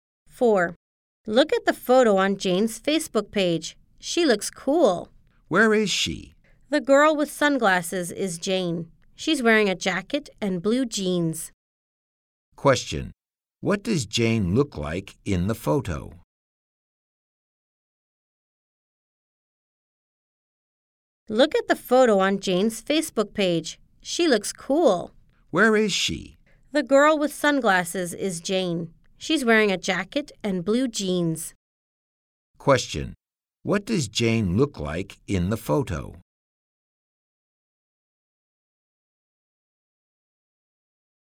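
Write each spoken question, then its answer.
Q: What does Jane look like in the photo?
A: She's wearing sunglasses, a jacket and blue jeans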